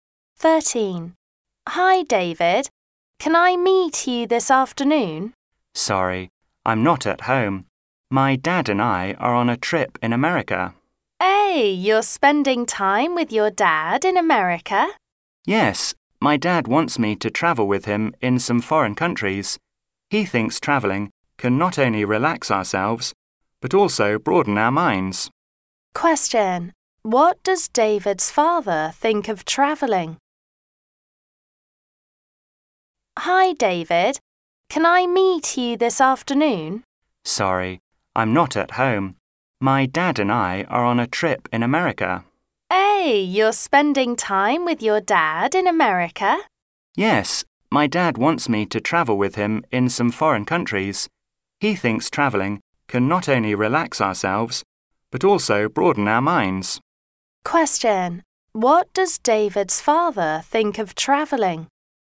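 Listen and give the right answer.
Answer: It can relax them and broaden their minds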